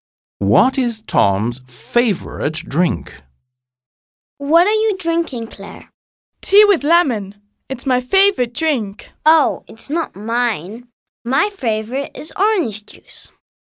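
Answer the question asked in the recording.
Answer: orange juice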